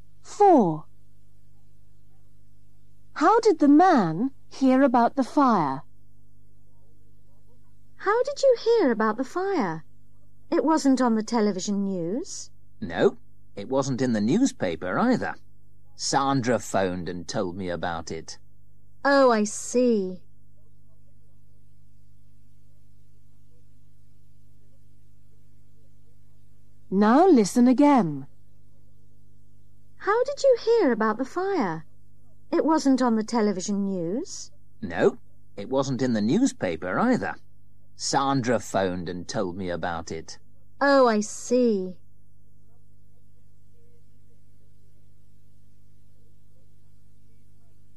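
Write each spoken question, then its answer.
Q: How did the man hear about the fire?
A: Sandra phoned him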